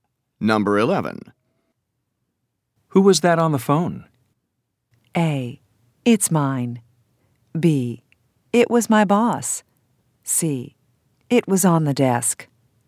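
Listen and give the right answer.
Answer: B: It was my boss.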